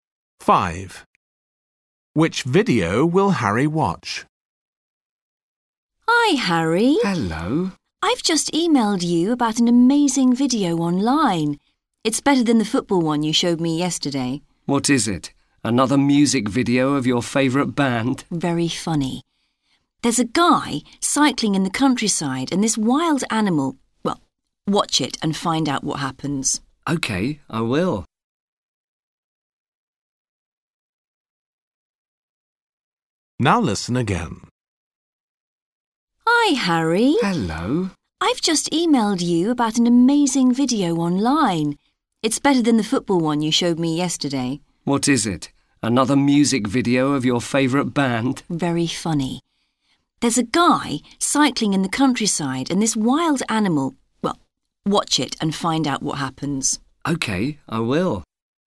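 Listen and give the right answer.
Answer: A video of a man cycling in the countryside and a wild animal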